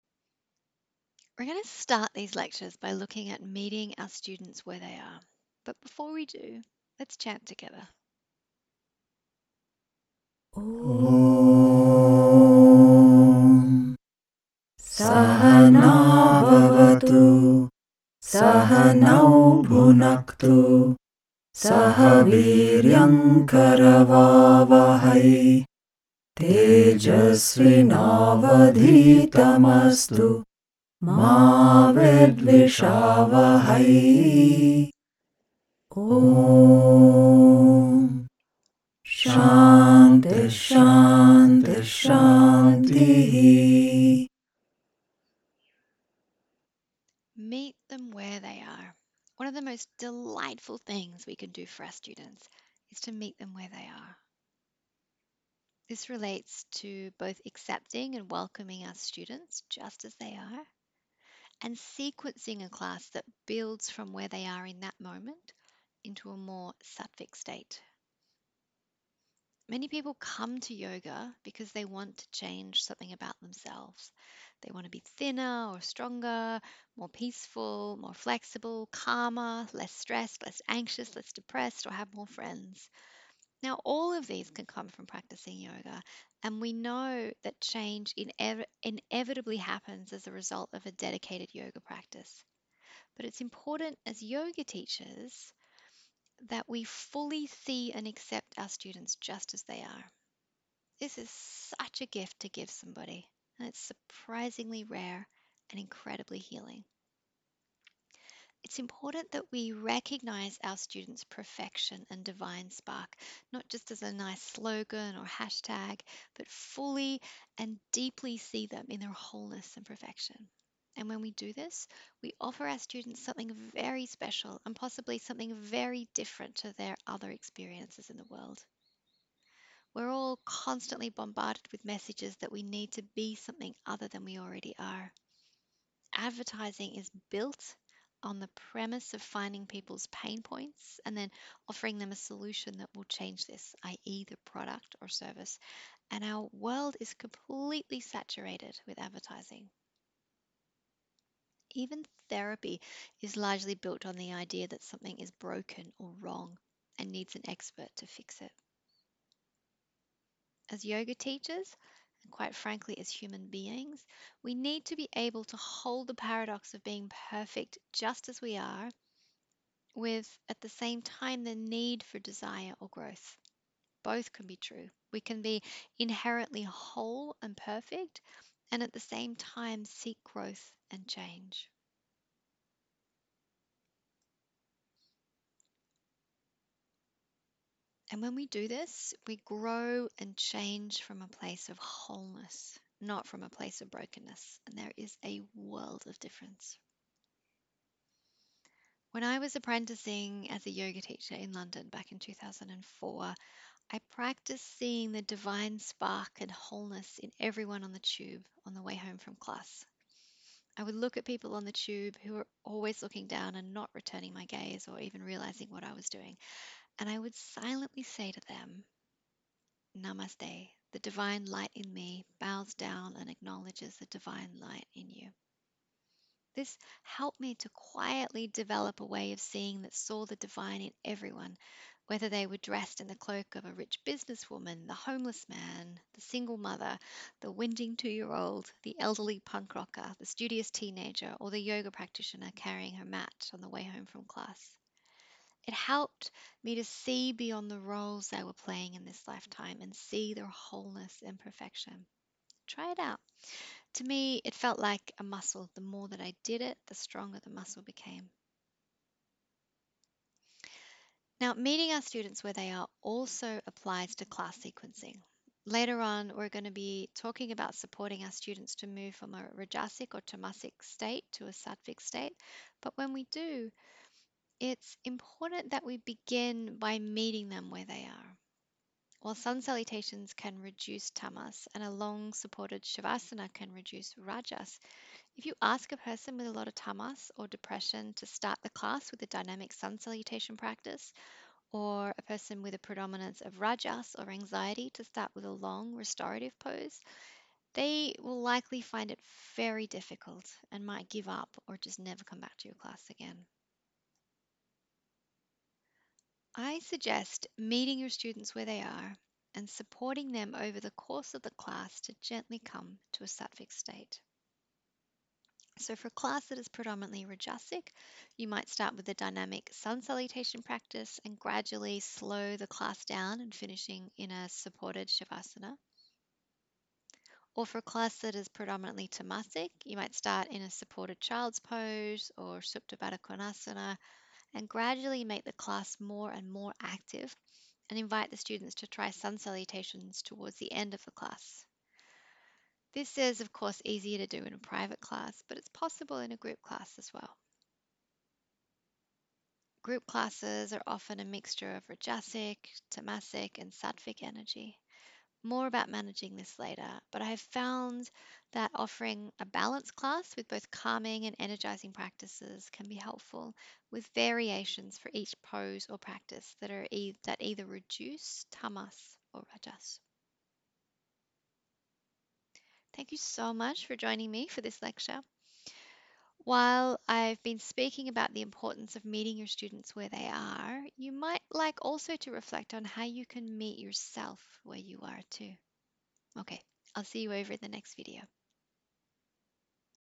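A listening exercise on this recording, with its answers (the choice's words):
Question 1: Meeting our students where they are relates to:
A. Accepting and welcoming our students just as they are.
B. Seeing the divine light in each student.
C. Sequencing a class that builds from where the students are, into a more sattvic state.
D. All of the above.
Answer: All of the above.

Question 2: For a class of students who are predominately rajasic, what would be an appropriate sequence to support them to come to a sattvic state?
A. Start with a dynamic sun salutation practice and gradually slow down and finish in supported savasana.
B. Start in supported child's pose and gradually make the class more active with sun salutations closer to the end of class.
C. Only offer standing poses.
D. Only offer seated poses.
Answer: Start with a dynamic sun salutation practice and gradually slow down and finish in supported savasana.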